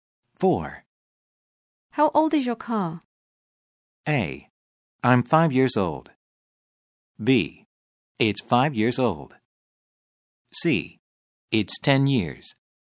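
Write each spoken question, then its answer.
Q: How old is your car?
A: B: It's 5 years old.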